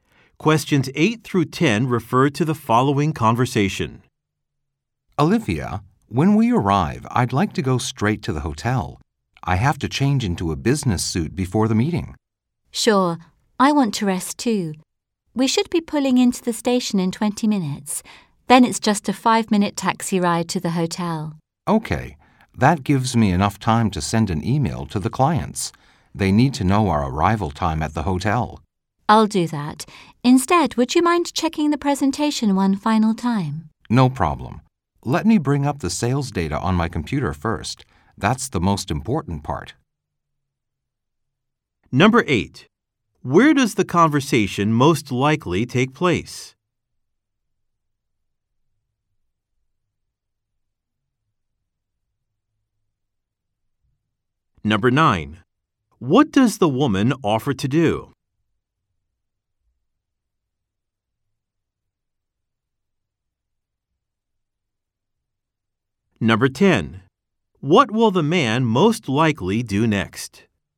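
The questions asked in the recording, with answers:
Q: Where does the conversation most likely take place?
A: On a train

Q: What does the woman offer to do?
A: Send an email to the clients

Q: What will the man most likely do next?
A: Bring up the sales data on his computer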